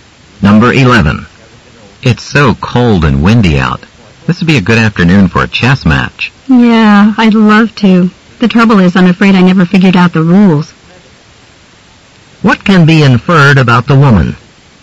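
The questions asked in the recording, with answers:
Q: What can be inferred about the woman?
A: She doesn't know how to play chess.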